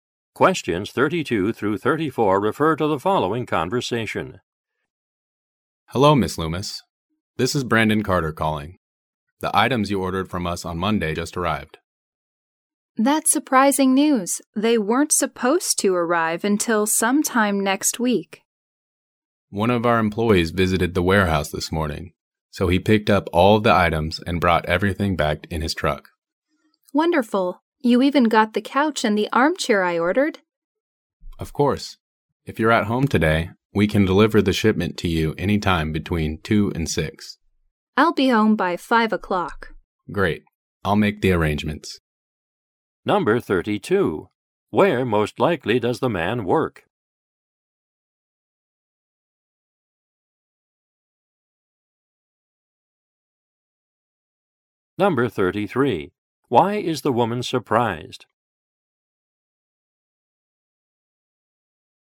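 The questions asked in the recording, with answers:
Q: Where most likely does the man work?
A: At a furniture store

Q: Why is the woman surprised?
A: Her order arrived earlier than expected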